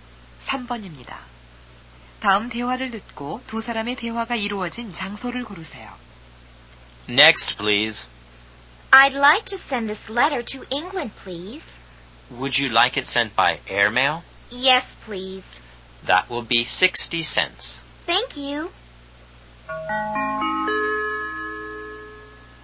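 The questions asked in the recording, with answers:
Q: 다음 대화를 듣고 두 사람의 대화가 이루어진 장소를 고르세요.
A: 우체국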